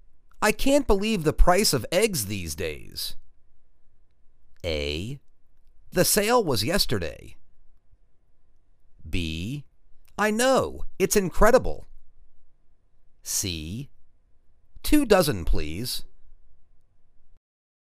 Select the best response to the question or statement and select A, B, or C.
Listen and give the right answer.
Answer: I know, it's incredible.